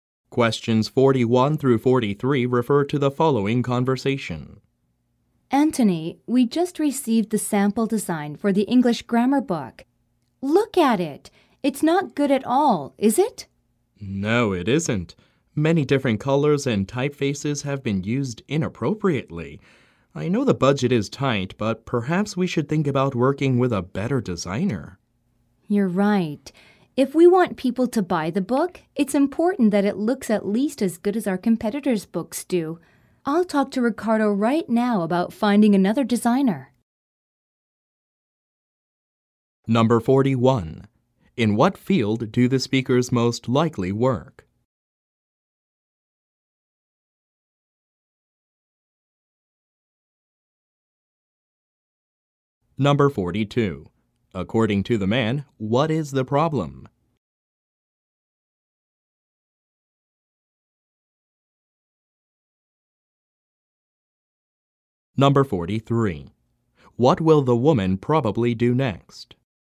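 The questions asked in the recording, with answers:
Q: In what field do the speakers most likely work?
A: Publishing

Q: According to the man, what is the problem?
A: The design uses many different colors and typefaces inappropriately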